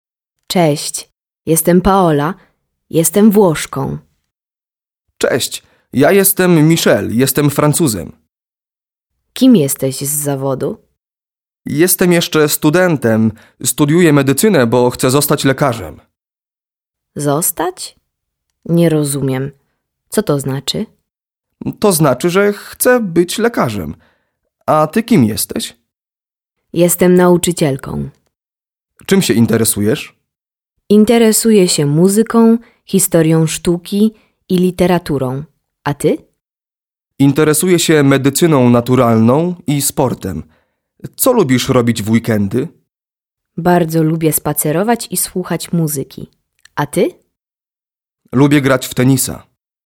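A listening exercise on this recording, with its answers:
Proszę posłuchać i odpowiedzieć na pytania.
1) Kim jest Paola?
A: Paola jest Włoszką.

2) Kim jest Michael?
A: Michael jest Francuzem.

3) Kim jest Michael z zawodu?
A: Jest studentem medycyny.

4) Kim chce zostać Michael?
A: Chce zostać lekarzem.

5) Kim jest Paola z zawodu?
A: Jest nauczycielką.

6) Czym ona się interesuje?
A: Interesuje się muzyką, historią sztuki i literaturą.

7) Czym on się interesuje?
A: Interesuje się medycyną naturalną i sportem.

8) Co lubi robić Paola?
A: Lubi spacerować i słuchać muzyki.

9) Co lubi robić Michael?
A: Lubi grać w tenisa.

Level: 9 клас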